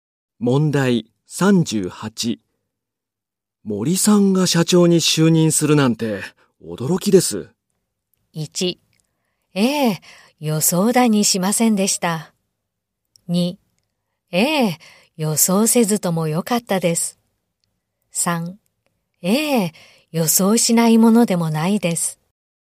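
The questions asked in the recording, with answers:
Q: 森さんが社長に就任するなんて驚きです。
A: 1: ええ、予想だにしませんでした。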